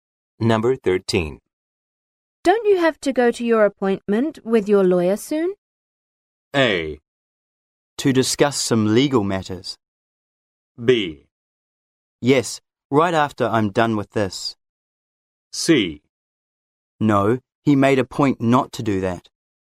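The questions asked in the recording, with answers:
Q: Don't you have to go to your appointment with your lawyer soon?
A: B: Yes, right after I'm done with this.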